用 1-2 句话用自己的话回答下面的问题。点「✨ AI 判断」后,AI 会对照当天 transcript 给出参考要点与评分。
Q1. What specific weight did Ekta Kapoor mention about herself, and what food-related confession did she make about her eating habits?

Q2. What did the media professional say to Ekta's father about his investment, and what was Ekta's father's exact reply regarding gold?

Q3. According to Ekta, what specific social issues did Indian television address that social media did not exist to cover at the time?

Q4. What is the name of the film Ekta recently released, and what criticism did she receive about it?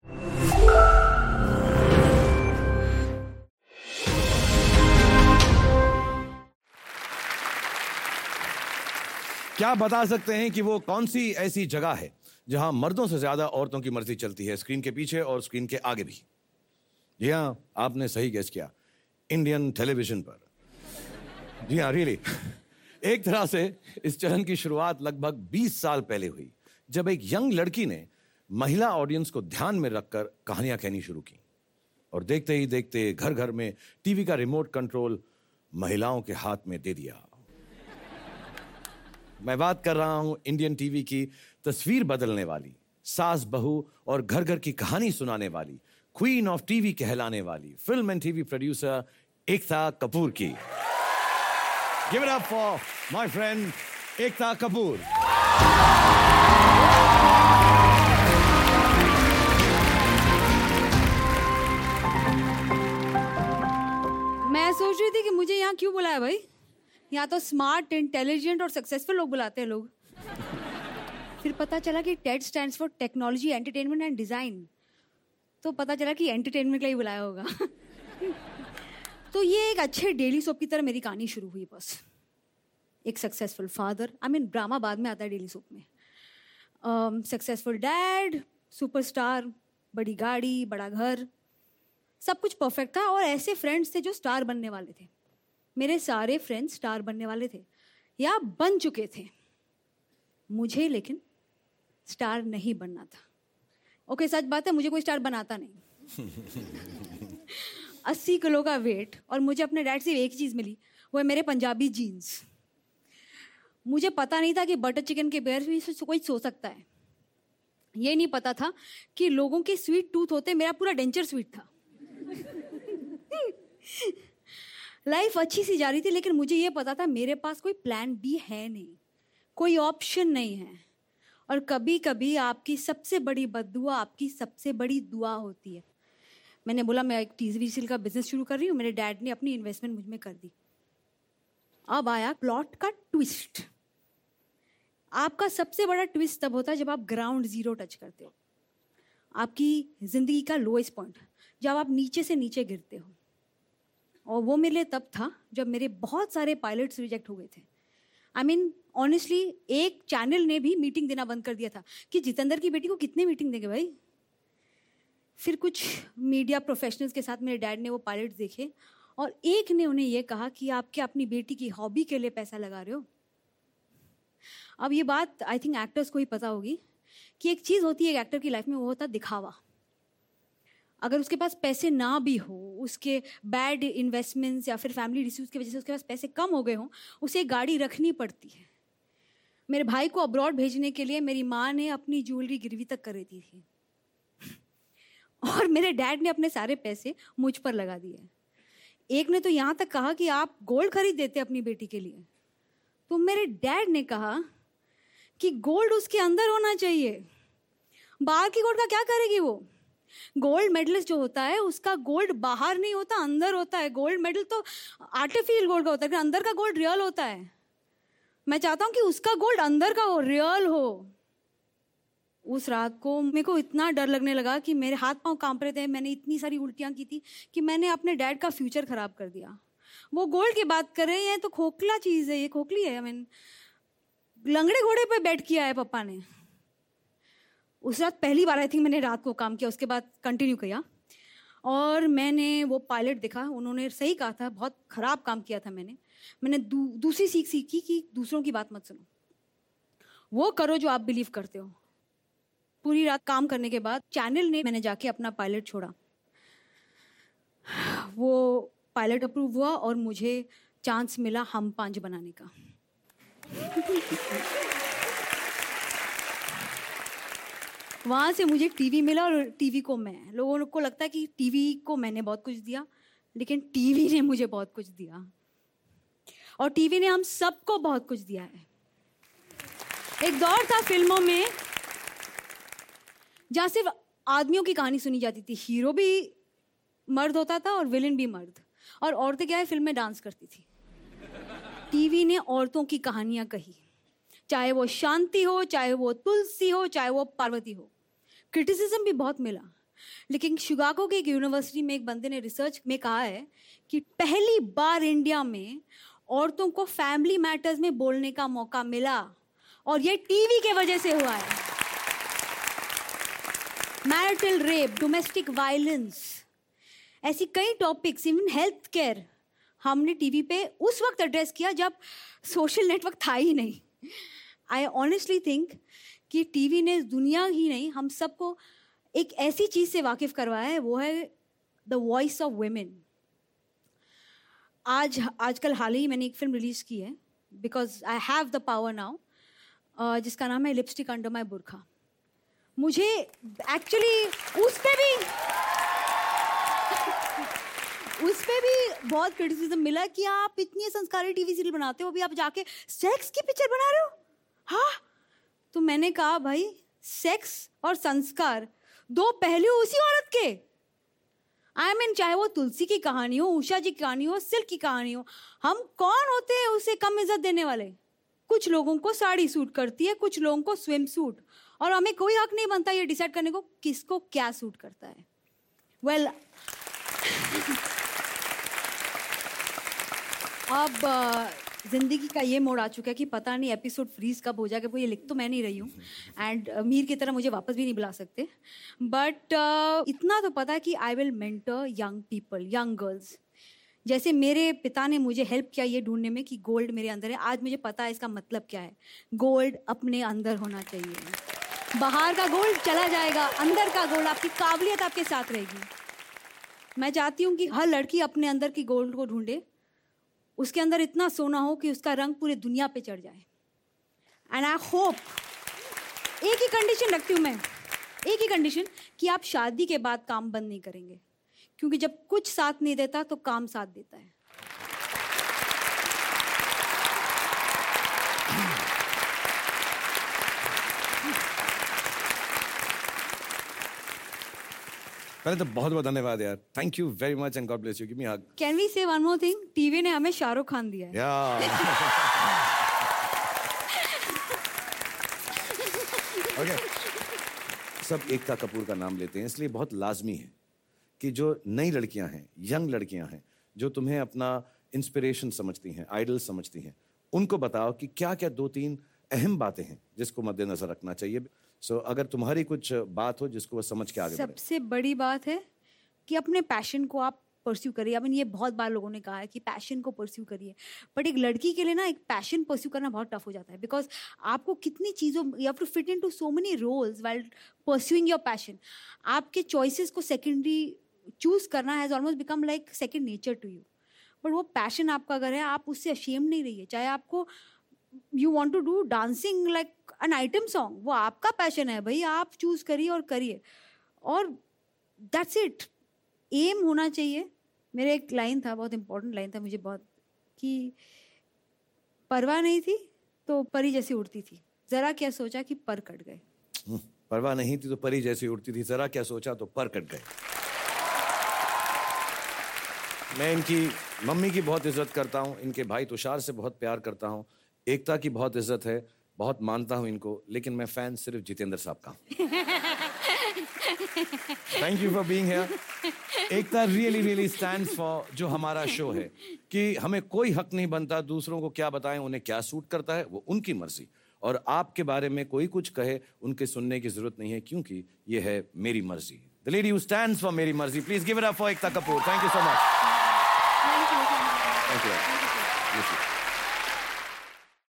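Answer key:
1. She weighed 80 kilos, and she didn't know anyone could go to bed without eating butter chicken (she had a whole sweet denture, not just a sweet tooth).
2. He asked if he was putting money into his daughter's hobby and said he should have bought her gold; her father replied that the gold should be inside her, not outside.
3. Marital rape, domestic violence and health care
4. Lipstick Under My Burkha; people criticized her because she makes traditional TV serials but was now releasing a sex film.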